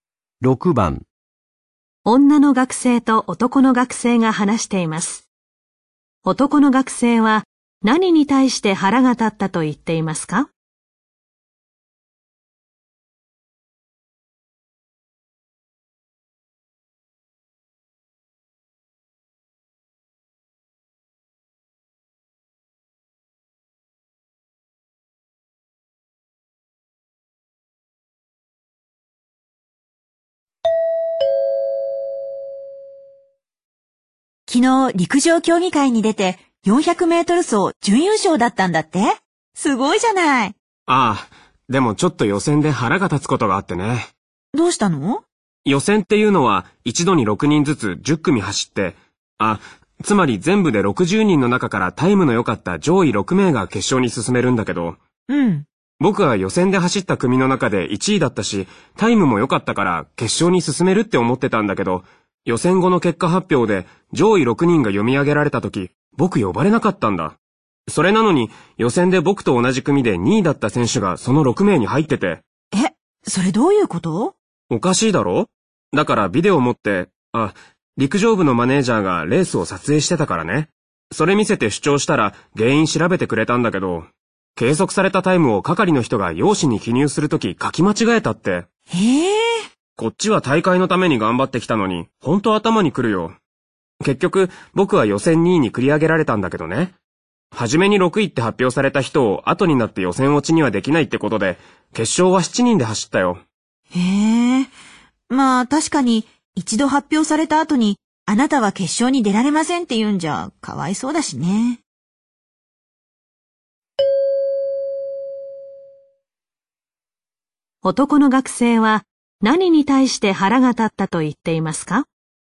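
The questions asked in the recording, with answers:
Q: 男の学生は何に対して腹が立ったと言っていますか?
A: 係の人がタイムを書き間違えたこと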